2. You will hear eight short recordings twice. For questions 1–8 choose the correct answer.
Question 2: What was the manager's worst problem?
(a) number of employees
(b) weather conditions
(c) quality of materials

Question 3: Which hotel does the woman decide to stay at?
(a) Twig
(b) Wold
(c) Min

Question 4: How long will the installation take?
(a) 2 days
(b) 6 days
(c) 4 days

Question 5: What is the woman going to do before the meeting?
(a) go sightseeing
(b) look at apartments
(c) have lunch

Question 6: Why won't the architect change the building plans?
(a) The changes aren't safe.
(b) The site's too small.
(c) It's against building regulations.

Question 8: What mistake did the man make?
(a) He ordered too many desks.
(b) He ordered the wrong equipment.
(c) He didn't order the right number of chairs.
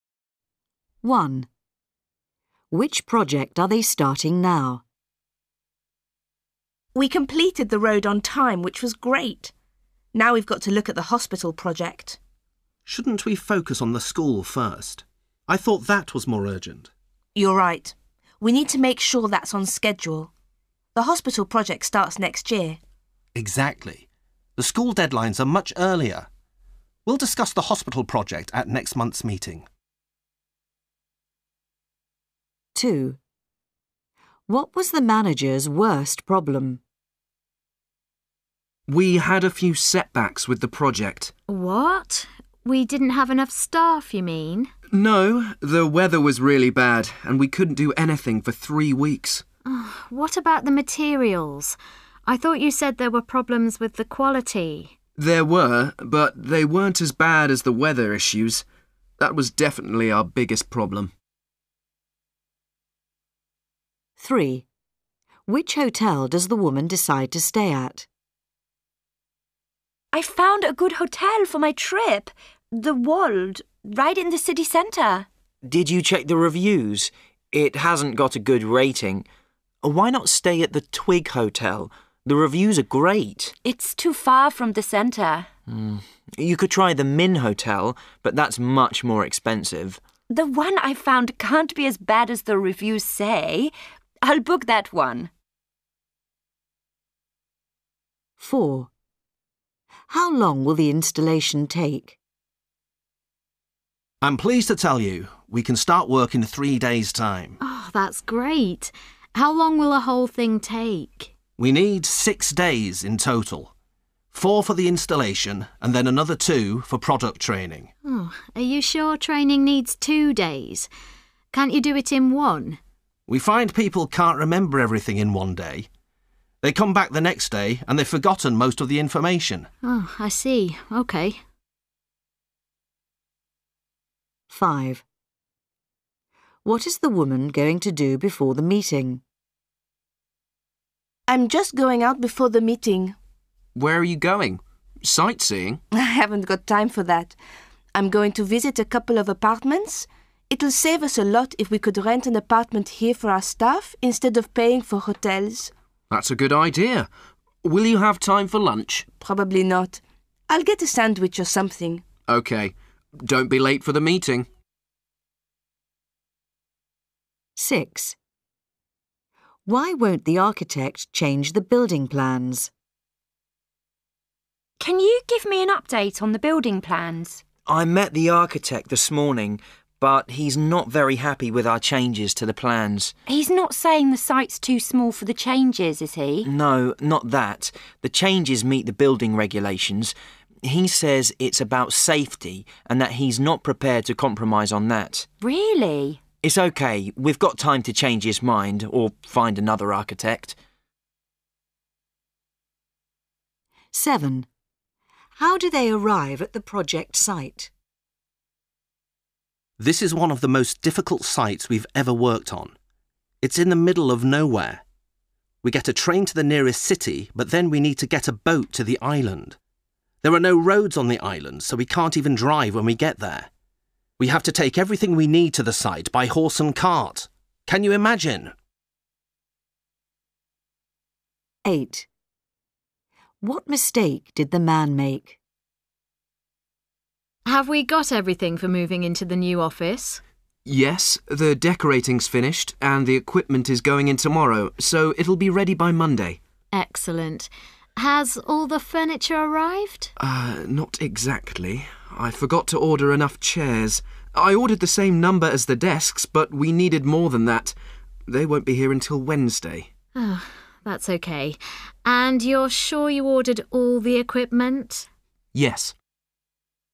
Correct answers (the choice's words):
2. weather conditions
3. Wold
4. 4 days
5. look at apartments
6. The changes aren't safe.
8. He didn't order the right number of chairs.

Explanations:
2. There were, but they weren't as bad as the weather issues. That was definitely our biggest problem.

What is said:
1 Which project are they starting now?
A: We completed the road on time, which was great. Now we've got to look at the hospital project.
B: Shouldn't we focus on the school first? I thought that was more urgent.
A: You're right. We need to make sure that's on schedule. The hospital project starts next year.
B: Exactly. The school deadlines are much earlier. We'll discuss the hospital project at next month's meeting.
2 What was the manager's worst problem?
A: We had a few setbacks with the project.
B: What? We didn't have enough staff, you mean?
A: No. The weather was really bad and we couldn't do anything for three weeks.
B: What about the materials? I thought you said there were problems with the quality?
A: There were, but they weren't as bad as the weather issues. That was definitely our biggest problem.
3 Which hotel does the woman decide to stay at?
A: I've found a good hotel for my trip – the Wold, right in the city centre.
B: Did you check the reviews? It hasn't got a good rating. Why not stay at the Twig Hotel? The reviews are great.
A: It's too far from the centre.
B: You could try the Min Hotel, but that's much more expensive.
A: The one I found can't be as bad as the reviews say. I'll book that one.
4 How long will the installation take?
A: I'm pleased to tell you we can start work in three days' time.
B: That's great. How long will the whole thing take?
A: We need six days in total. Four for the installation and then another two for product training.
B: Are you sure training needs two days, can't you do it in one?
A: We find people can't remember everything in one day. They come back the next day and they've forgotten most of the information.
B: I see. Okay.
5 What is the woman going to do before the meeting?
A: I'm just going out before the meeting.
B: Where're you going? Sightseeing?
A: I haven't got time for that. I'm going to visit a couple of apartments. It'll save us a lot if we could rent an apartment here for our staff instead of paying for hotels.
B: That's a good idea. Will you have time for lunch?
A: Probably not. I'll get a sandwich or something.
B: OK. Don't be late for the meeting.
6 Why won't the architect change the building plans?
A: Can you give me an update on the building plans?
B: I met the architect this morning, but he's not very happy with our changes to the plans.
A: He's not saying the site's too small for the changes, is he?
B: No, not that. The changes meet the building regulations. He says it's about safety and that he's not prepared to compromise on that.
A: Really?
B: It's okay, we've got time to change his mind or find another architect.
7 How do they arrive at the project site?
This is one of the most difficult sites we've ever worked on. It's in the middle of nowhere. We get a train to the nearest city but then we need to get a boat to the island. There are no roads on the island so we can't even drive when get there. We have to take everything we need to the site by horse and cart. Can you imagine?
8 What mistake did the man make?
A: Have we got everything for moving into the new office?
B: Yes. The decorating's finished and the equipment is going in tomorrow, so it'll be ready by Monday.
A: Excellent. Has all the furniture arrived?
B: Not exactly. I forgot to order enough chairs. I ordered the same number as the desks but we needed more than that. They won't be here until Wednesday.
A: That's okay. And you're sure you ordered all the equipment?
B: Yes.
3.